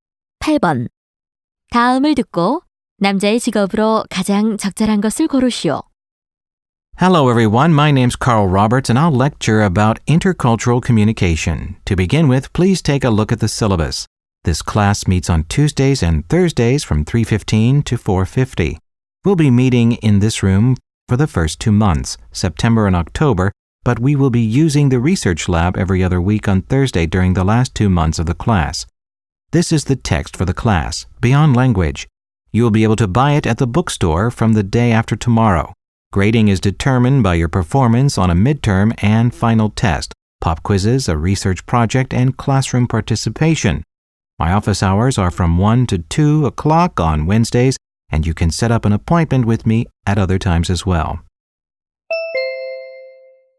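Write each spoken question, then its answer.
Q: 다음을 듣고 남자의 직업으로 가장 적절한 것을 고르시오.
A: 교수(강사)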